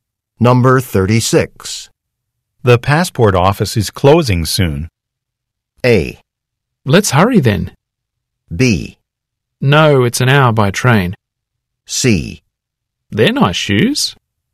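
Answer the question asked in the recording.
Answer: A: Let's hurry then.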